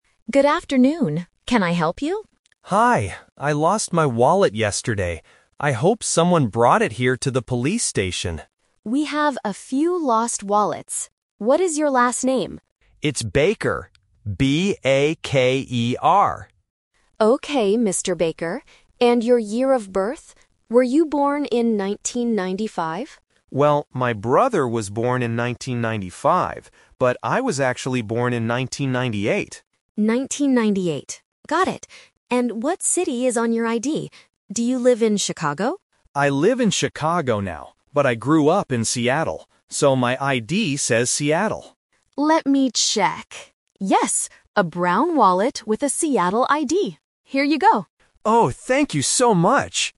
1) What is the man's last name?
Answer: Baker

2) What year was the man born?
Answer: In 1998.

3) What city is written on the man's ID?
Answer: Seattle.

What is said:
Officer: Good afternoon. Can I help you?
Kevin: Hi. I lost my wallet yesterday. I hope someone brought it here to the police station.
Officer: We have a few lost wallets. What is your last name?
Kevin: It's Baker. B-A-K-E-R.
Officer: Okay, Mr. Baker. And your year of birth? Were you born in 1995?
Kevin: Well, my brother was born in 1995, but I was actually born in 1998.
Officer: 1998, got it. And what city is on your ID? Do you live in Chicago?
Kevin: I live in Chicago now, but I grew up in Seattle. So, my ID says Seattle.
Officer: Let me check... Yes! A brown wallet with a Seattle ID. Here you go.